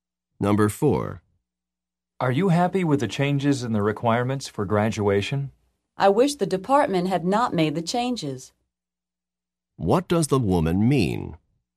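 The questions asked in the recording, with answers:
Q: What does the woman mean?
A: She is not happy that the department changed the requirements.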